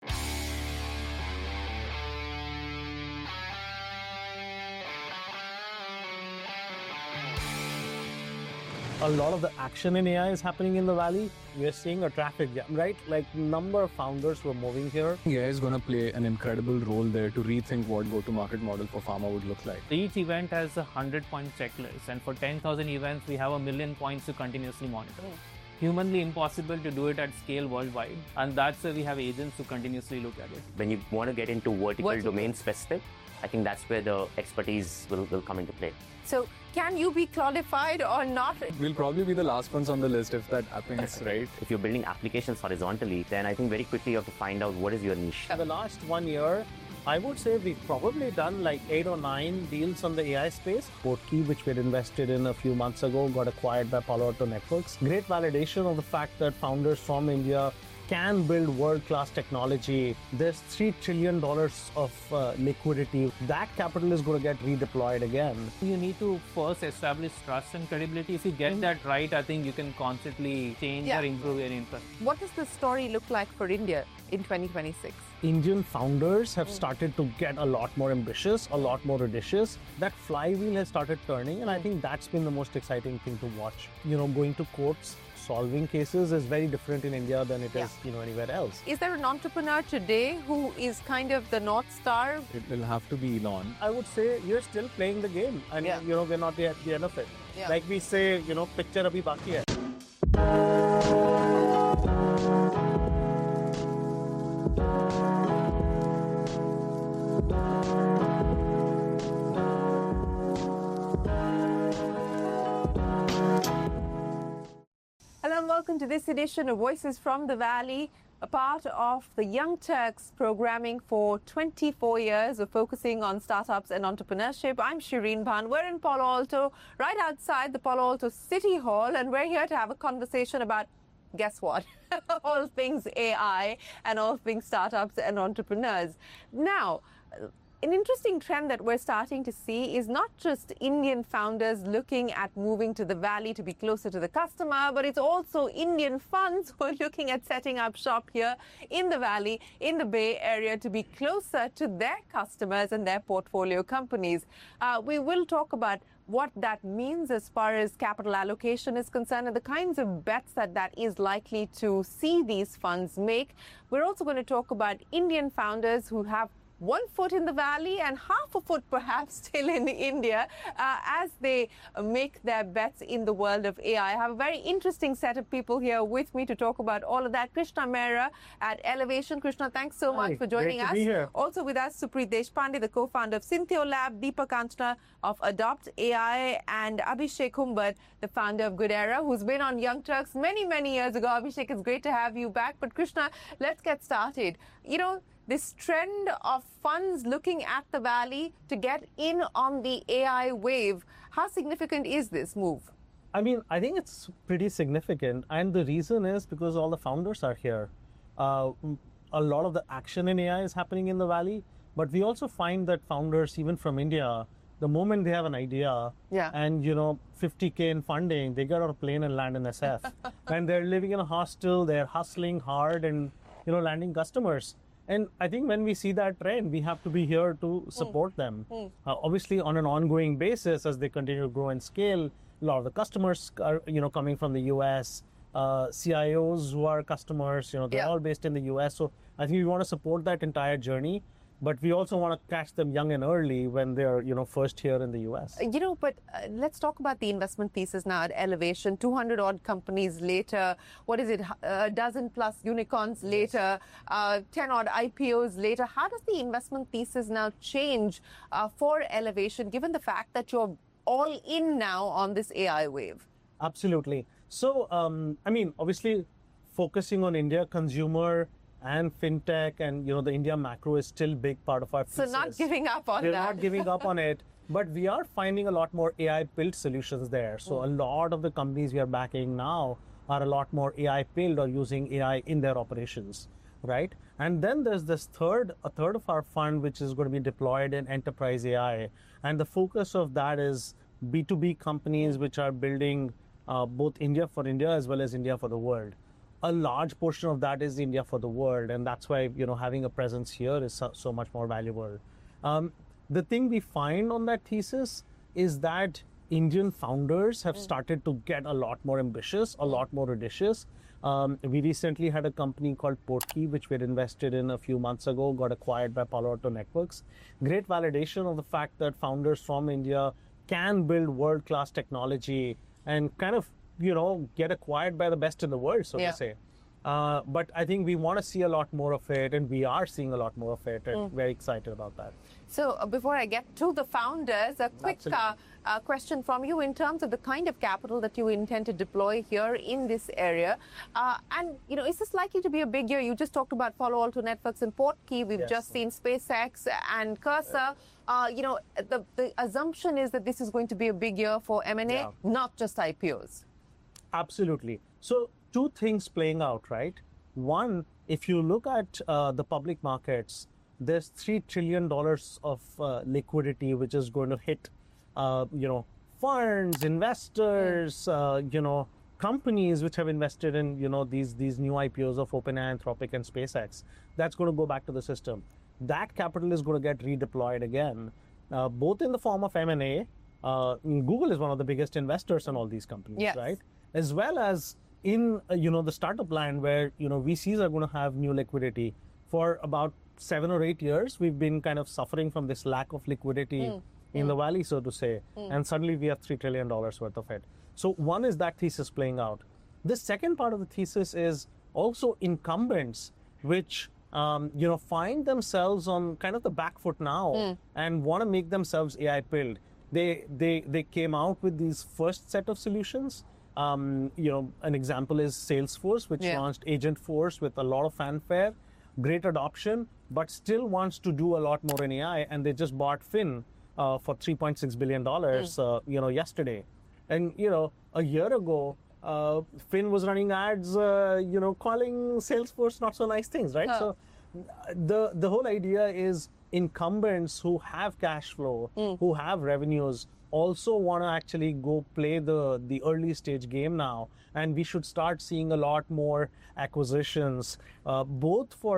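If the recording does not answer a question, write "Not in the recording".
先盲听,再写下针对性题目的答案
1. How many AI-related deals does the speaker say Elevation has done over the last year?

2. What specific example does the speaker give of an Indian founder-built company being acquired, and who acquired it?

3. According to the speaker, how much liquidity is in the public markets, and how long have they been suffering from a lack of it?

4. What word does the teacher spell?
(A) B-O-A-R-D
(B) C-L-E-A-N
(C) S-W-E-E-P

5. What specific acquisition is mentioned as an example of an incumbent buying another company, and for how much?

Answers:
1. Probably eight or nine deals in the AI space.
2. Portkey, acquired by Palo Alto Networks.
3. Three trillion dollars; about seven or eight years.
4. Not in the recording
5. Salesforce buying Finn for 3.6 billion dollars.

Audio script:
A lot of the action in AI is happening in the valley, we're seeing a traffic jam, right?
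Like number of founders were moving here.
AI is going to play an incredible role there to rethink what the market model for pharma would look like.
Each event has 100-point checklists and for 10,000 events we have a million points to continuously monitor.
It's humanly impossible to do it at scale worldwide and that's why we have agents to continuously look at it.
When you want to get into vertical domain specific, I think that's where the expertise will come into play.
So, can you be qualified or not?
We'll probably be the last ones on the list if that happens, right?
If you're building applications horizontally, then I think very quickly you have to find out what is your niche.
In the last one year, I would say we've probably done like eight or nine deals on the AI space.
The key which we had invested in a few months ago got acquired by Palo Alto Networks.
Great validation of the fact that founders from India can build world-class technology.
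That capital is going to get redeployed again.
You need to first establish trust and credibility.
If you get that right, I think you can constantly change or improve your input.
What does the story look like for India in 2026?
Indian founders have started to get a lot more ambitious, a lot more audacious.
That flywheel has started turning and I think that's been the most exciting thing to watch.
You know, going to courts, solving cases is very different in India than anywhere else.
Is there an entrepreneur today who is kind of the North Star?
It will have to be Elon.
I would say you're still playing the game and you know, we're not at the end of it.
Like we say, you know, picture abhi baki hai.
Welcome to this edition of Voices from the Valley,
a part of the Young Turks programming for 24 years of focusing on startups and entrepreneurship.
I'm Shirin Ban. We're in Palo Alto, right outside the Palo Alto city hall
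and we're here to have a conversation about, guess what, all things AI
and all things startups and entrepreneurs.
Now, an interesting trend that we're starting to see is not just Indian founders
looking at moving to the valley to be closer to the customer,
but it's also Indian funds who are looking at setting up shop here in the valley,
looking at moving to the Valley to be closer to the customer, but it's funds who are looking at setting up shop here in the Valley, in the Bay Area to be closer to their customers and their portfolio companies. We will talk about what that means as far as capital allocation is concerned and the kinds of bets that that is likely to see these funds make. We're also going to talk about Indian founders who have one foot in the Valley and half a foot perhaps still in
the India as they make their bets in the world of AI. I have a very interesting set of people here with me to talk about all of that. 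Krishna Mera at Elevation. Krishna, thanks so much for joining us. Also with us Supreet Deshpande, the co-founder of Cintio Lab, Deepak Anchana of Adopt AI, and Abhishek Kumar, the founder of Goodera, who's been on Young Turks many, many years ago. Abhishek, it's great to have you back, but Krishna, let's get started. You know, this trend of funds looking
at the Valley to get in on the AI wave, how significant is this move? >> I mean, I think it's pretty significant, and the reason is because all the founders are here. A lot of the action in AI is happening in the Valley, but we also find that founders even from India, the moment they have an idea >> Yeah. >> Yeah. >> and, you know, 50K in funding, they get on a plane and land in SF. And they're living in a hostel, they're hustling hard, and,
you know, landing customers. And I think when we see that trend, we have to be here to support them. 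Obviously, on an ongoing basis as they continue to grow and scale, A lot of the customers you know coming from the US CIOs who are customers, you know, they're all based in the US. So I think we want to support that entire journey, but we also want to catch them young and early when they are you know first here in the US. in the US. >> You
know, but let's talk about the investment pieces now at Elevation.
So I think we want to support that entire journey, but we also want to catch them young and early when they're, you know, first here in the US.
You know, but let's talk about the investment pieces now.
At Elevation, 200 odd companies later, what is it, a dozen plus unicorns later, uh, 10 odd ipos later.
How does the investment pieces now change, uh, for elevation, given the fact that you're all in now on this AI wave?
Absolutely.
So, um, I mean, obviously focusing on India consumer and fintech and you know the India macro is still big part of our.
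So not giving up on that.
We're not giving up on it, but we are finding a lot more AI built solutions there.
So a lot of the companies we are backing now are a lot more AI failed or using AI in their operations, right?
And then there's this third, a third of our fund, which is going to be deployed in enterprise AI.
And the focus of that is b to B companies, which are building, uh, both India for India as well as India for the world.
A large portion of that is India for the world.
And that's why, you know, having a presence here is so, so much more valuable.
Great validation of the fact that founders from India can build world class technology and kind of, you know, get acquired by the best in the world, so to say.
Uh, but I think we want to see a lot more of it and we are seeing a lot more of it and very excited about that.
So before I get to the founders, a quick, uh, uh, question from you in terms of the kind of capital that you intend to deploy here in this area.
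Uh, and, you know, is this likely to be a big year?
You just talked about follow all to Netflix and port key.
We've just seen Spacex and cursor.
Uh, you know, the, the Assumption is that this is going to be a big year for M&A, not just ipos.
Absolutely.
So two things playing out, right?
One, if you look at, uh, the public markets, there's $3 trillion of, uh, liquidity which is going to hit, uh, you know, firms, investors, uh, you know, companies which have invested in, you know, these, these new ipos of Open Anthropic and Spacex, that's going to go back to the system.
Google is one of the biggest investors in all these companies, right, as well as in, you know, the startup land where, you know, vcs are going to have new liquidity.
For about seven or eight years, we've been kind of suffering from this lack of liquidity in the valley, so to say, and suddenly we have $3 trillion worth of it.
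So one is that thesis playing out.
The second part of the thesis is also incumbents, which, you know, find themselves on kind of the back foot now and want to make themselves AI build.
They, they, they came out with these first set of solutions.
Um, you know, an example is Salesforce, which launched Agent Force with a lot of fanfare, great adoption, but still wants to do a lot more in AI and they just bought Finn, uh, for $3.6 billion.
Uh, you know, yesterday and, you know, a year ago, uh, Finn was running ads, uh, you know, calling Salesforce not so nice things, right?
So the, the whole idea is incumbents who have cash flow, who have revenues also want to actually go play the, the early stage game now and we should start seeing a lot more acquisitions, both for buying the business.
Buying the technology as well as buying the talent that can build that technology in their company.
Yes.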